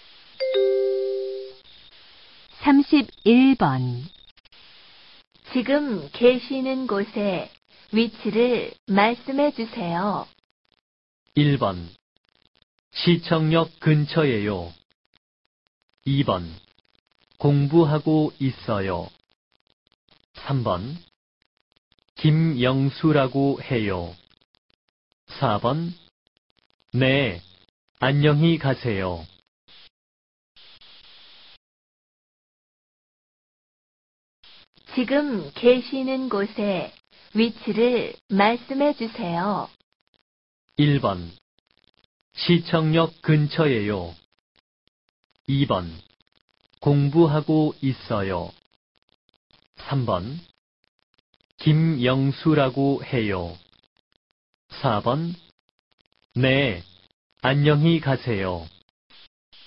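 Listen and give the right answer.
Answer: 1: 시청역 근처예요.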